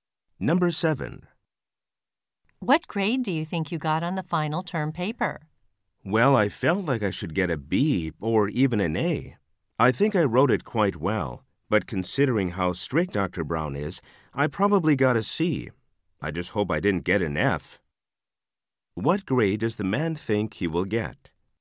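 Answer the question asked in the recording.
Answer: A C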